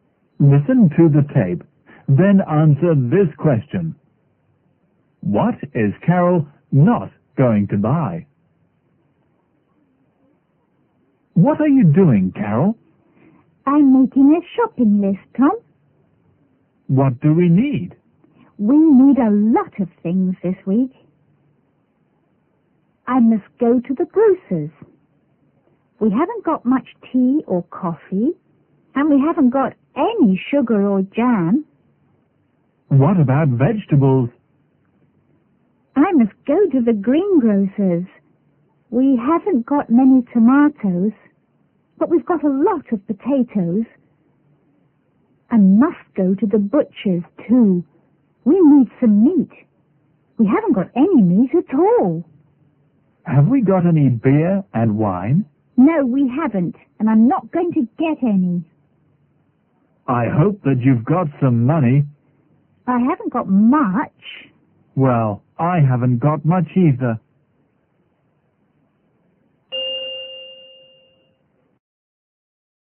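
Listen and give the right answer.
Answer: Beer and wine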